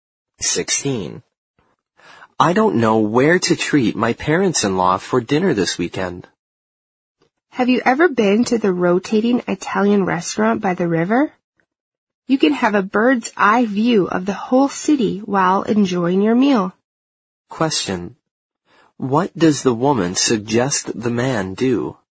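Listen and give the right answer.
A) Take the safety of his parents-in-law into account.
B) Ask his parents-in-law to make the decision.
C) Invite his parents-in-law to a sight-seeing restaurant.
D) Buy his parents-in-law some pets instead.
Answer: C) Invite his parents-in-law to a sight-seeing restaurant.

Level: 四级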